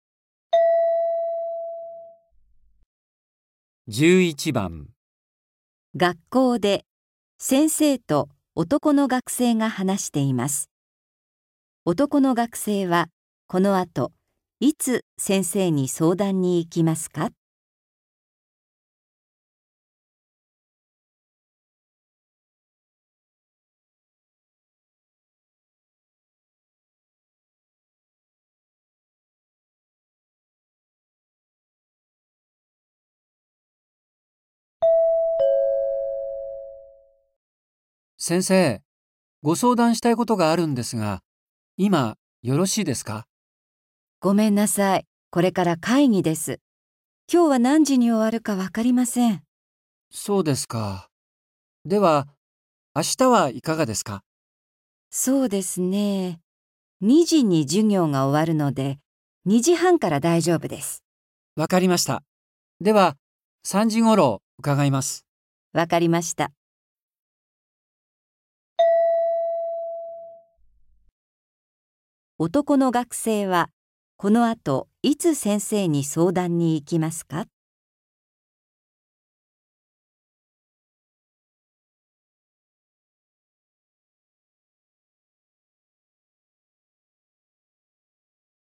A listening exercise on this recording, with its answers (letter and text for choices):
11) 男の学生は、この後いつ先生に相談に行きますか。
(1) 会議の あと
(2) 今日の 2時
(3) 明日の 2時半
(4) 明日の 3時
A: (4) 明日の 3時

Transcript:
M:先生、ご相談したいことがあるんですが、今よろしいですか。
F:ごめんなさい。これから会議です。今日は何時に終わるかわかりません。
M:そうですか。では、明日はいかがですか。
M:わかりました。では、3時ごろ伺います。

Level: N4